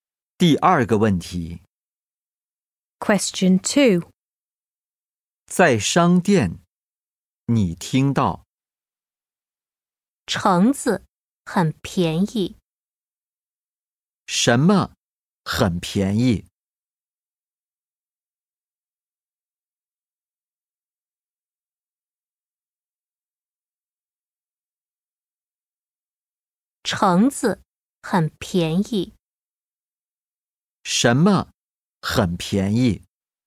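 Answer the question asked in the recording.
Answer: 橙子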